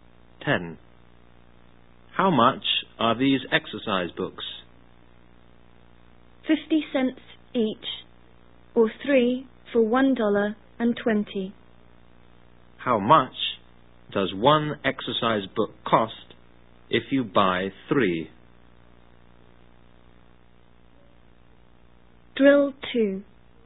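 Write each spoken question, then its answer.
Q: How much does one exercise book cost if you buy 3?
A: 40 cents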